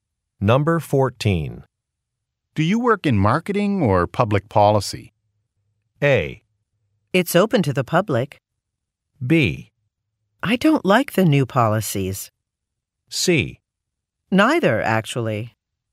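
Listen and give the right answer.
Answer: C: Neither, actually.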